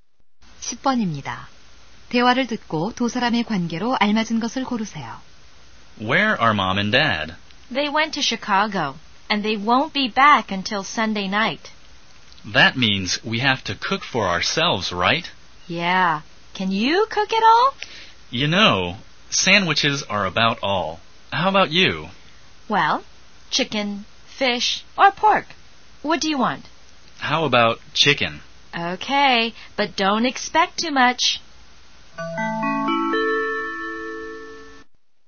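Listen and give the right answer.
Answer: 남매(형제자매)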